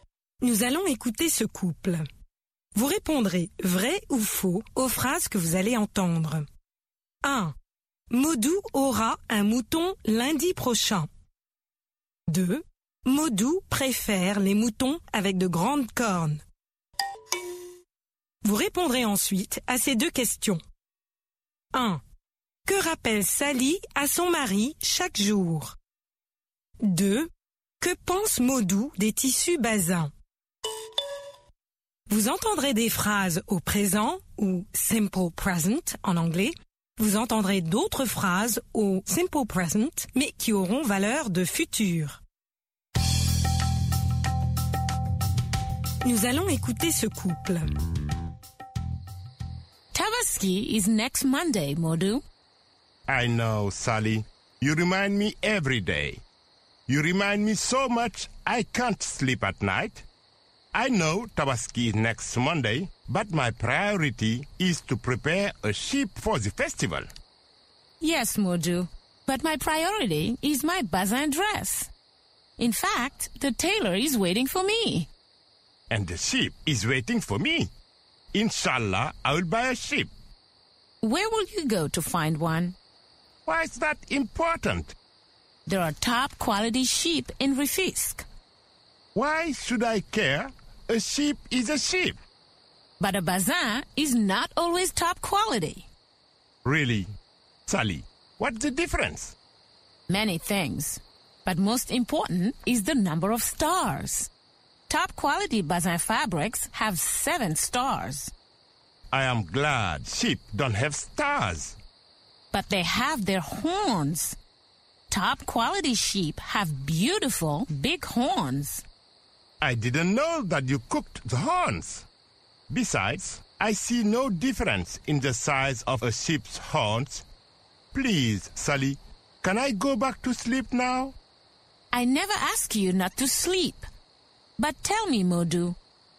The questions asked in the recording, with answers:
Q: Modou aura un mouton lundi prochain.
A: L'énoncé 1 est vrai. Maudou aura un mouton lundi prochain.

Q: Modou préfère les moutons avec de grandes cornes.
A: L'énoncé 2 est faux. Maudou préfère les moutons avec de grandes cornes.

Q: Que rappelle Sally à son mari chaque jour?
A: Sally rappelle chaque jour à son mari que la Tabaski est lundi prochain.